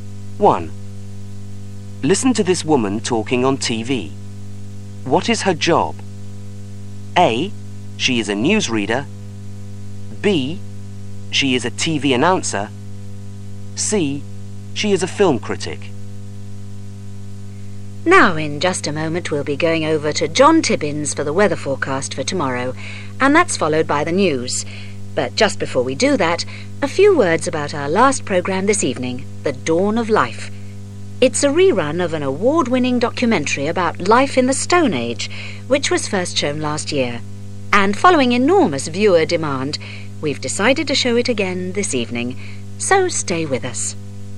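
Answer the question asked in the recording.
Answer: B: She is a TV announcer.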